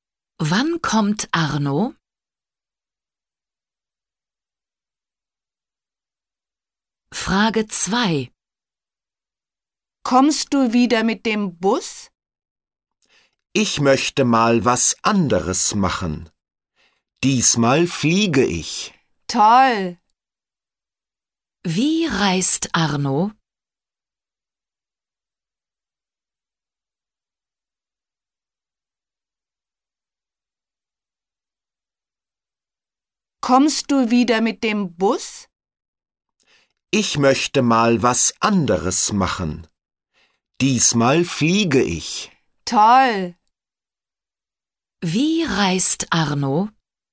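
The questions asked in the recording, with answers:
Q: Wie reist Arno?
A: Er fliegt (mit dem Flugzeug)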